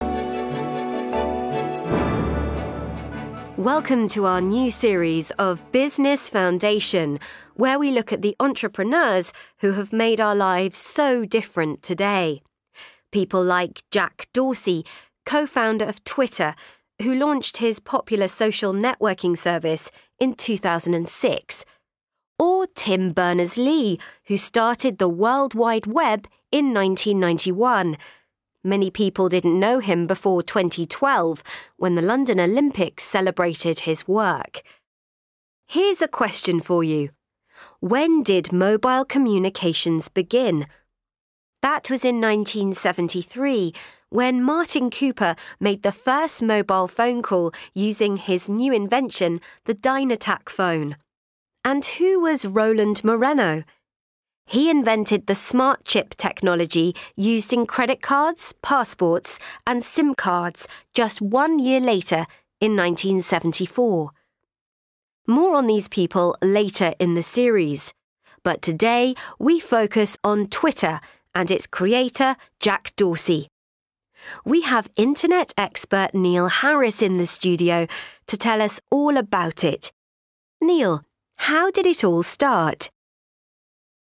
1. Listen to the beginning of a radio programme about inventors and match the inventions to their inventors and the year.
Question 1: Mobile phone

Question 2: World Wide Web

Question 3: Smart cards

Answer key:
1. Martin Cooper – 1973
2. Tim Berners-Lee – 1991
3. Roland Moreno – 1974

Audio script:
Welcome to our new series of Business Foundation, where we look at the entrepreneurs who have made our lives so different today. People like Jack Dorsey, co-founder of Twitter, who launched his popular social networking service in 2006. Or Tim Berners-Lee, who started the World Wide Web in 1991. Many people didn't know him before 2012, when the London Olympics celebrated his work.
Here's a question for you: when did mobile communications begin? That was is 1973, when Martin Cooper made the first mobile phone call using his new invention, the Dyna-TAC phone. And who was Roland Moreno? He invented the smart chip technology used in credit cards, passports and SIM cards just one year later, in 1974.
More on these people later in the series, but today we focus on Twitter, and its creator Jack Dorsey. We have Internet expert Neil Harris in the studio to tell us all about it. Neil, how did it all start?